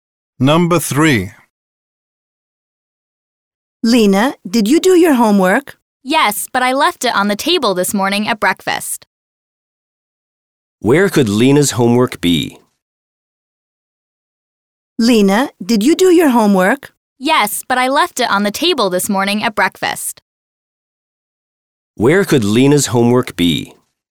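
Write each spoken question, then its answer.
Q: Where could Lena's homework be?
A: On the table where she had breakfast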